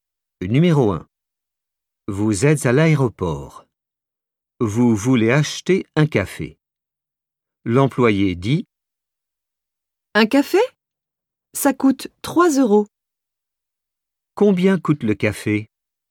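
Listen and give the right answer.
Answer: 3 euros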